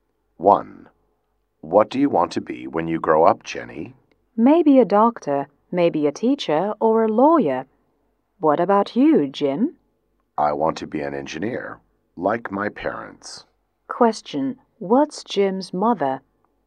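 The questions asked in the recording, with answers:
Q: what's Jim's mother?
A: An engineer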